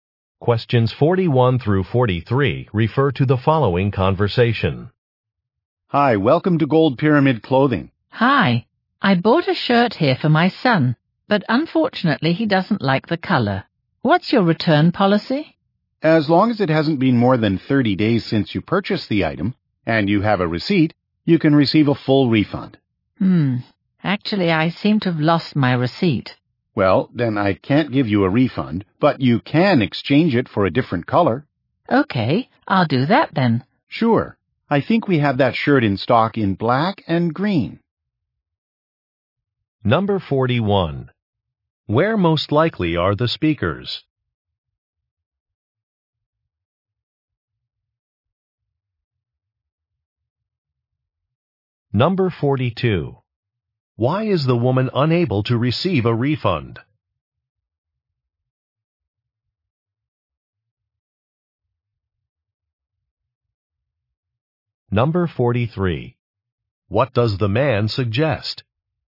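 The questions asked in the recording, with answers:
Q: Where most likely are the speakers?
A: In a clothing store

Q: Why is the woman unable to receive a refund?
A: She lost her receipt

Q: What does the man suggest?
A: Exchanging the shirt for a different color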